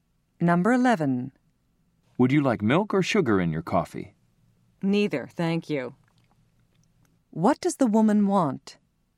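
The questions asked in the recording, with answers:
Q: What does the woman want?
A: Coffee with neither milk nor sugar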